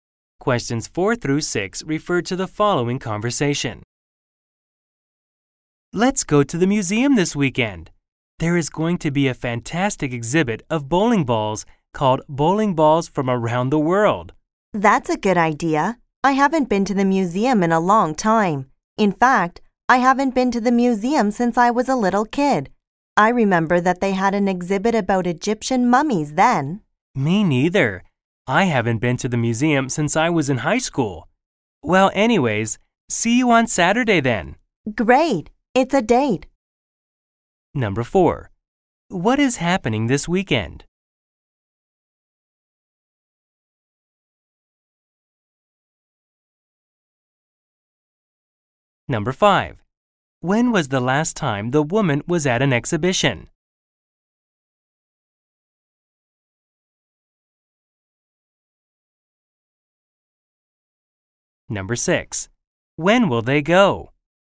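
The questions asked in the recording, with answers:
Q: What is happening this weekend?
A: A bowling ball exhibit at the museum

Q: When will they go?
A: On Saturday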